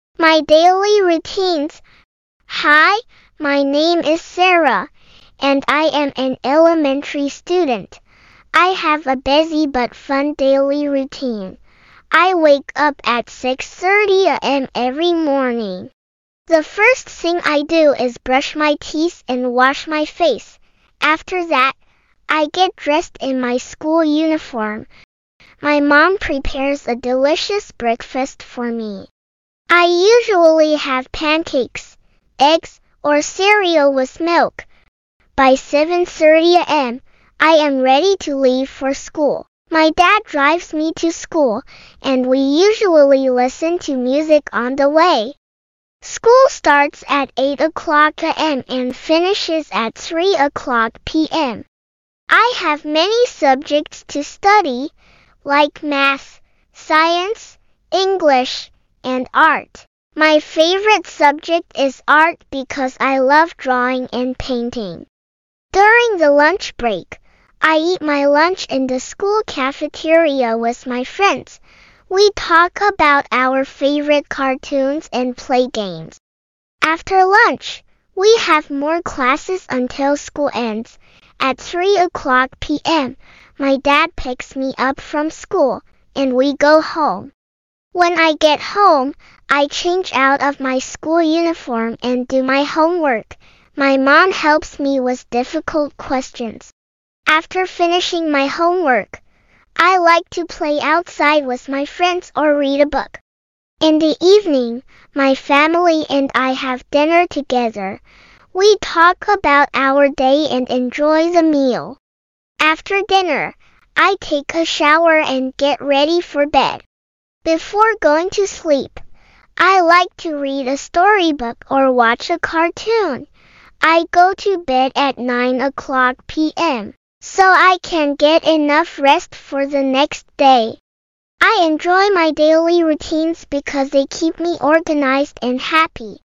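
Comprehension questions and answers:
Test your understanding on the audio with this 10-question multiple-choice quiz. Choose the correct answer for each question.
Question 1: What time does Sarah wake up every morning?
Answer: 6:30 a.m.

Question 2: What is the first thing Sarah does after waking up?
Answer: She brushes her teeth and washes her face.

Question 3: Who prepares Sarah's breakfast?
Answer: Her mom

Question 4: How does Sarah get to school?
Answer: Her dad drives her.

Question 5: What is Sarah's favorite subject?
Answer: Art

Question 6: Where does Sarah eat her lunch?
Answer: In the school cafeteria

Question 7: What does Sarah do when she gets home from school?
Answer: She changes out of her uniform and does her homework.

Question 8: Who helps Sarah with her homework?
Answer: Her mom

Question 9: What does Sarah do before going to bed?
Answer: She reads a storybook or watches a cartoon.

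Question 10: What time does Sarah go to bed?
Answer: 9 p.m.

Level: Basic English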